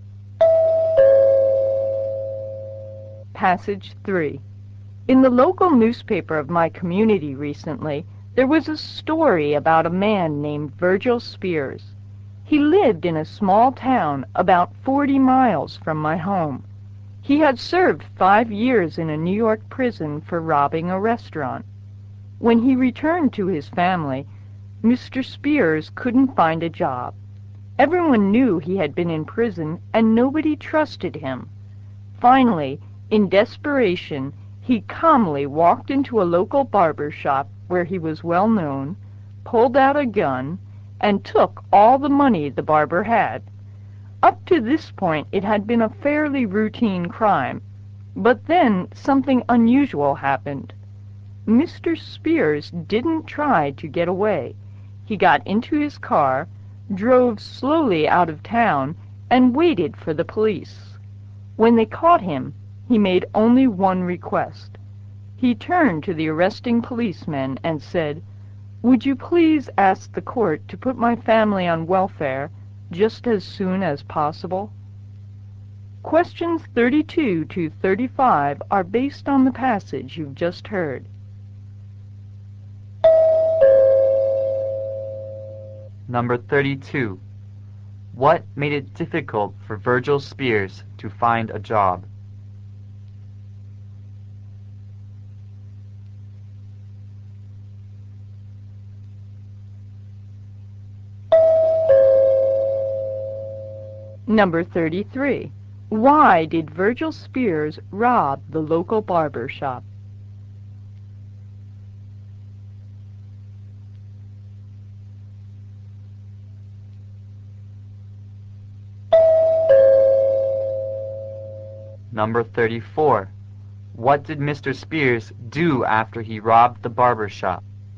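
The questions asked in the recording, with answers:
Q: What made it difficult for Virgil Spears to find a job?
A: He had been in prison and nobody trusted him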